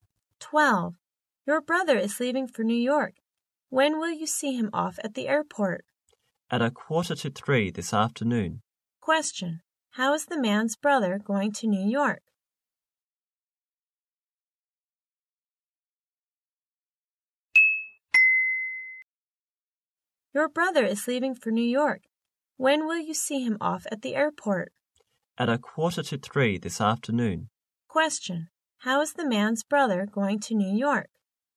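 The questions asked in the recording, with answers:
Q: How is the man's brother going to New York?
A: By plane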